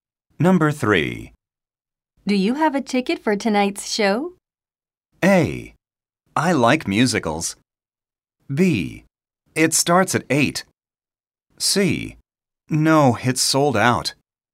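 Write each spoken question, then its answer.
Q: Do you have a ticket for tonight's show?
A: C: No, it's sold out.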